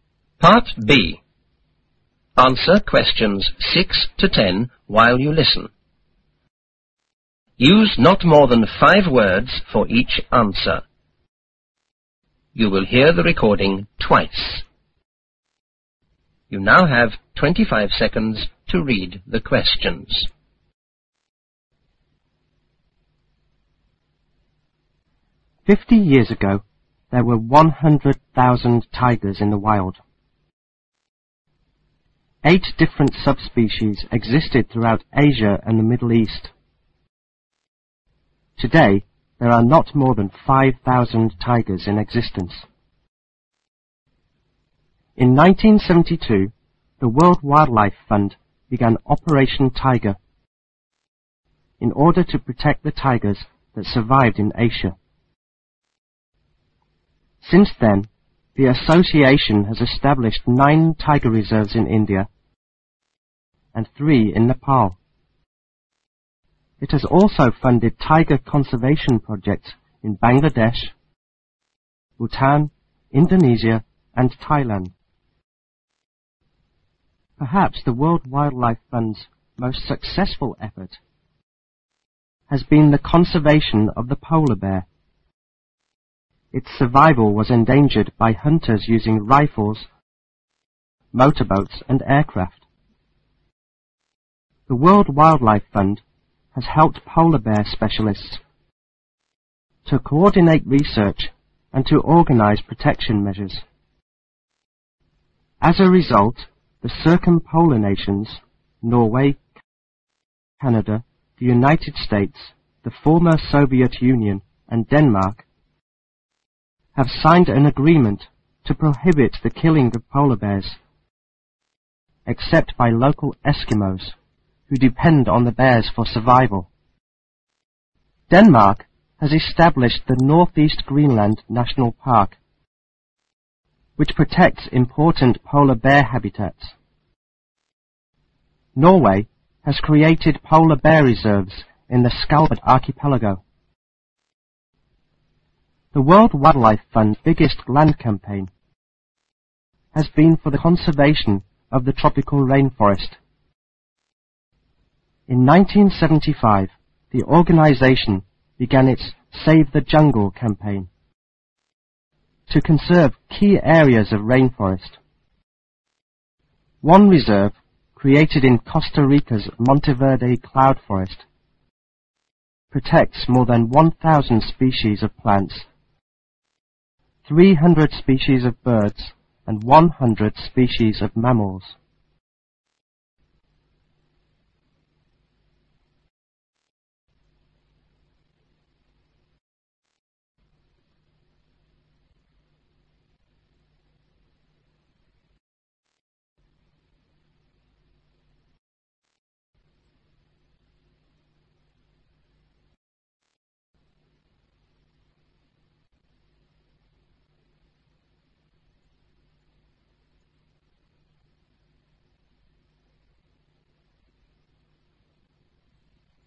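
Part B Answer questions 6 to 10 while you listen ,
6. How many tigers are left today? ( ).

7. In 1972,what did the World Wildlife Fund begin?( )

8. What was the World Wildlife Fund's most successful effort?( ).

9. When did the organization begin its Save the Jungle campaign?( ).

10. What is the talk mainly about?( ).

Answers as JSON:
{"6": "Not more than 5,000", "7": "Operation Tiger", "8": "Conservation of the polar bear", "9": "In 1975", "10": "World Wildlife Fund's conservation work"}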